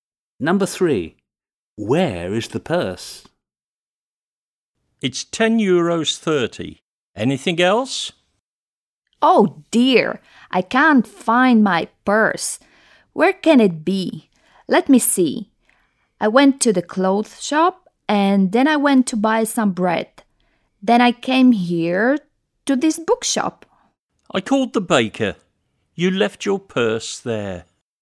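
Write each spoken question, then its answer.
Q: Where is the purse?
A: at the baker's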